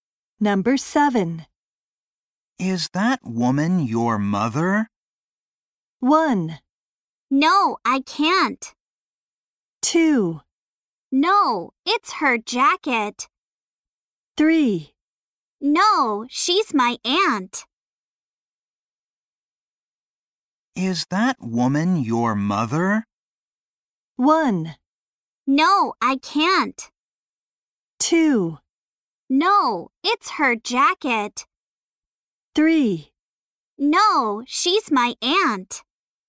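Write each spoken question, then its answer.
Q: Is that woman your mother?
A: 3: No, she's my aunt.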